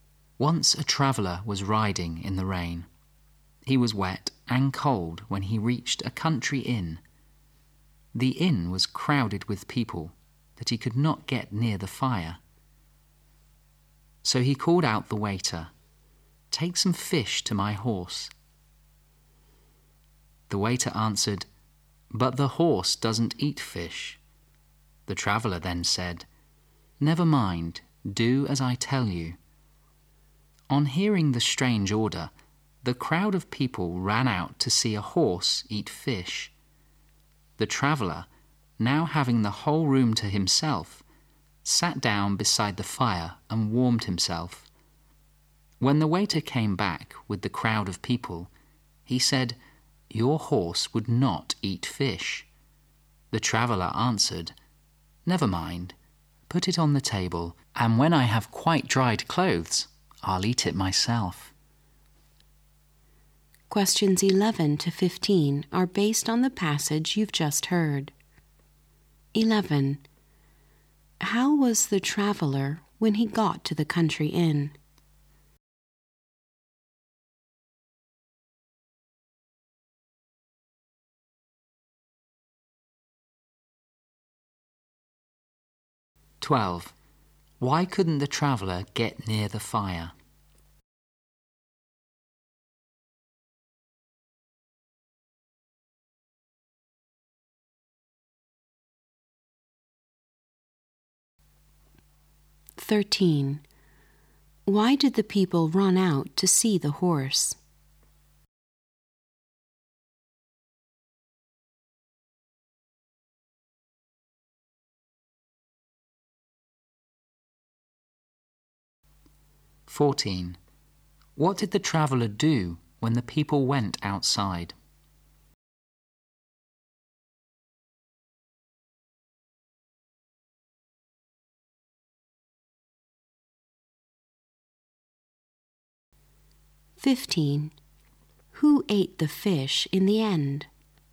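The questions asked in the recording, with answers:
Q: How was the traveller when he got to the country inn?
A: Wet and cold

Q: Why couldn't the traveller get near the fire?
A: The inn was crowded

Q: Why did the people run out to see the horse?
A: To see a horse eat fish

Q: What did the traveller do when the people went outside?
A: Sat by the fire and warmed himself

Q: Who ate the fish in the end?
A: The traveller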